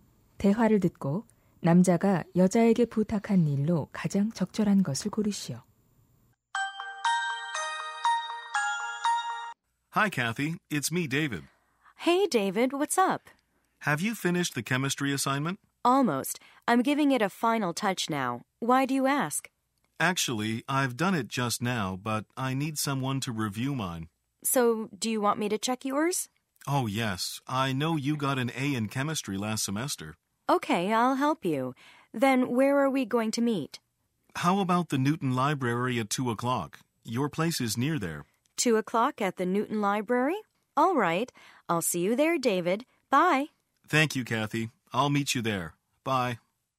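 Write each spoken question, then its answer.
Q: 대화를 듣고 남자가 여자에게 부탁한 일로 가장 적절한 것을 고르시오.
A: 화학 과제 검토해 주기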